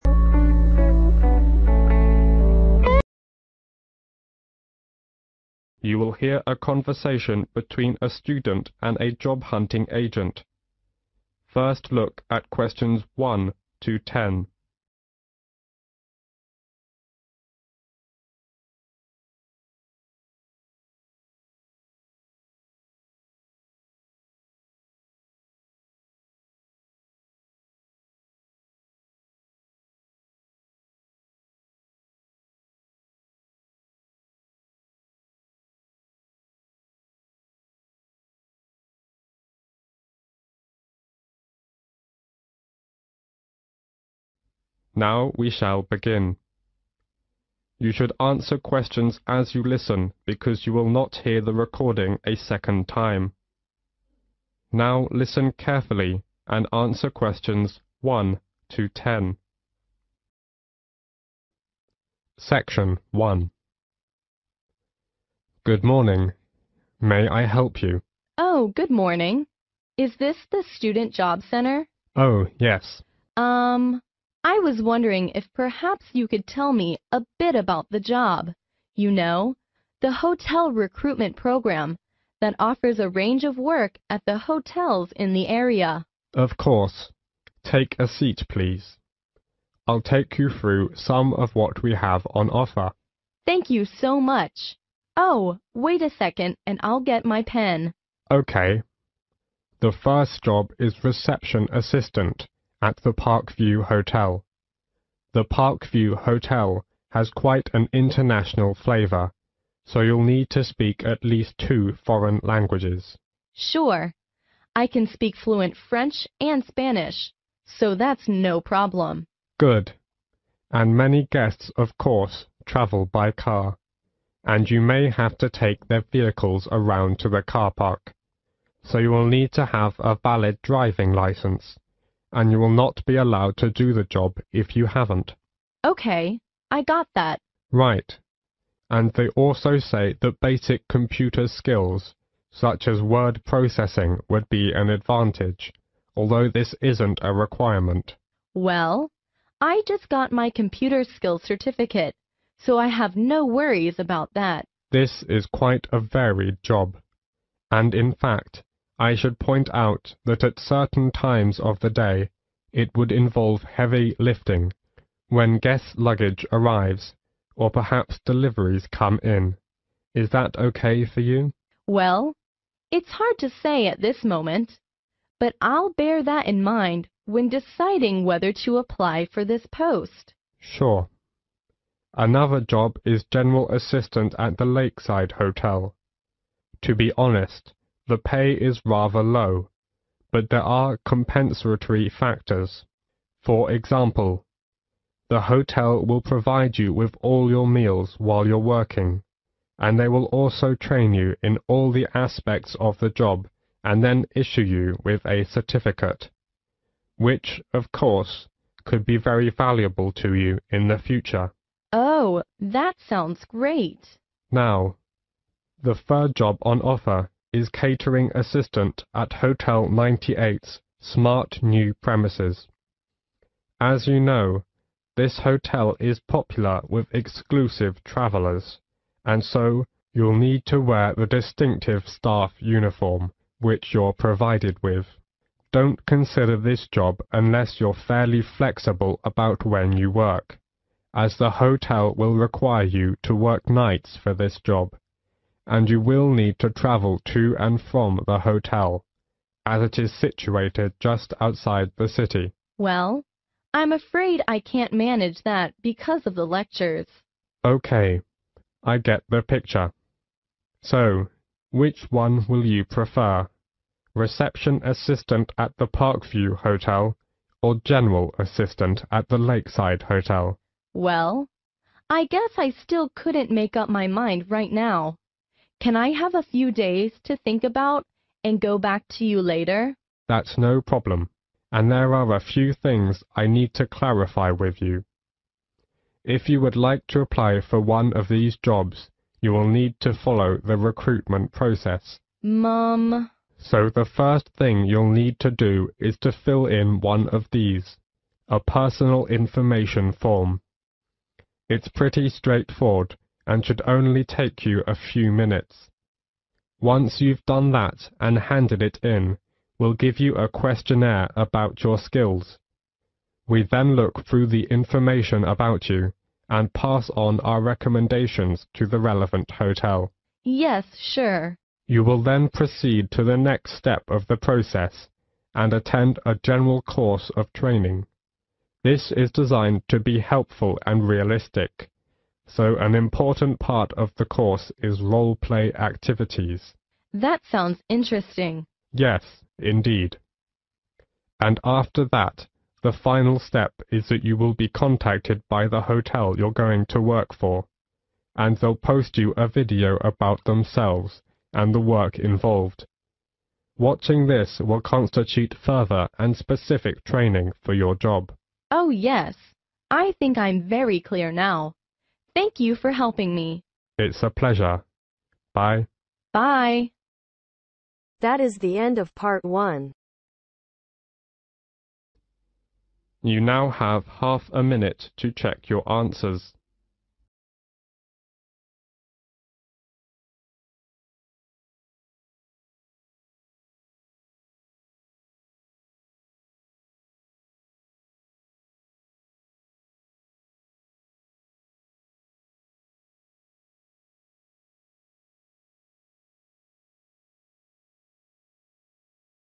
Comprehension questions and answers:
Complete the table below. Write NO MORE THAN TWO WORDS for each answer.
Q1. Position 1 .............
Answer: Reception Assistant

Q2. have a valid 2 .............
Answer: driving license

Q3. include 3 ..............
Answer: heavy lifting

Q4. free 4 ..............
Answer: meals

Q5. Issue a 5 .............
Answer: certificate

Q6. Wear 6 ..............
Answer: staff uniform

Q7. Complete a 7 ........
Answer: personal information form

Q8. Do a 8 ........ about personal skills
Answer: questionnaire

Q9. A training course involving 9 ........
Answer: role-play activities

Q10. Get a 10 ......... about the work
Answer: video